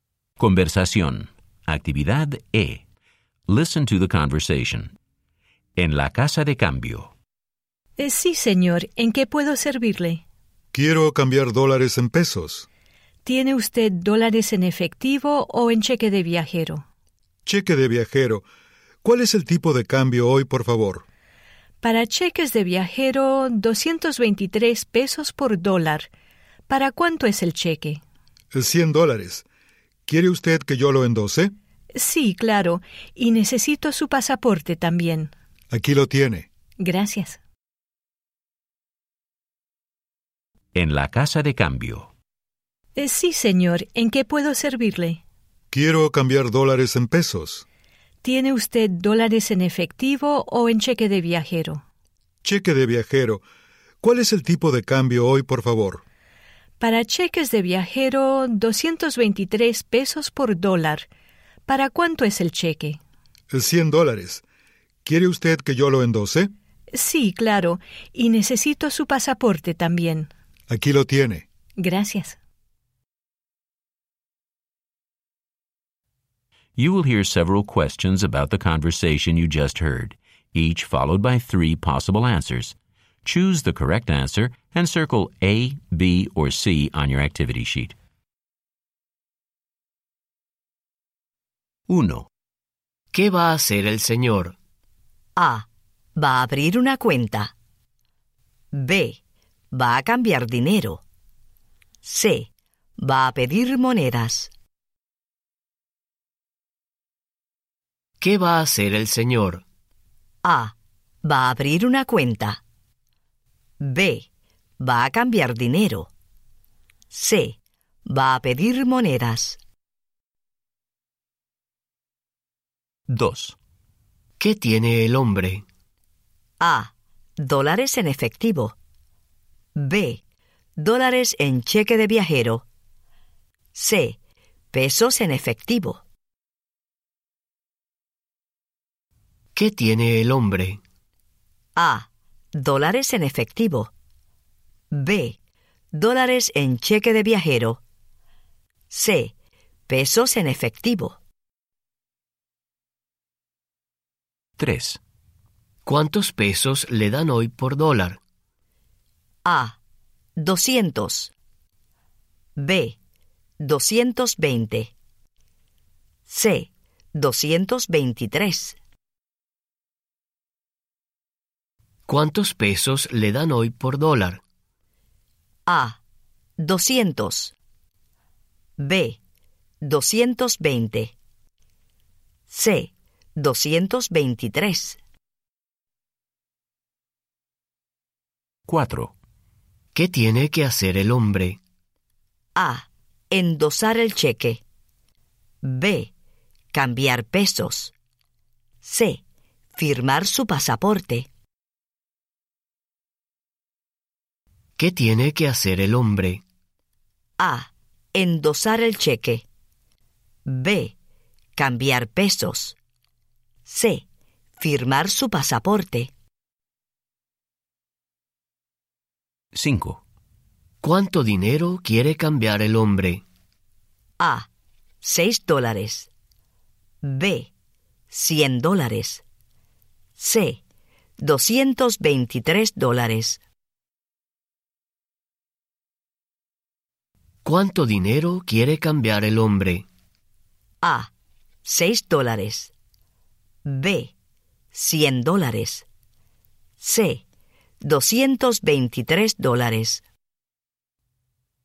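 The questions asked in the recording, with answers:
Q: ¿Qué va a hacer el señor?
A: B: Va a cambiar dinero.

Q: ¿Qué tiene el hombre?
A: B: Dólares en cheque de viajero.

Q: ¿Cuántos pesos le dan hoy por dólar?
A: C: 223.

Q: ¿Qué tiene que hacer el hombre?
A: A: Endosar el cheque.

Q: ¿Cuánto dinero quiere cambiar el hombre?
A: B: $100.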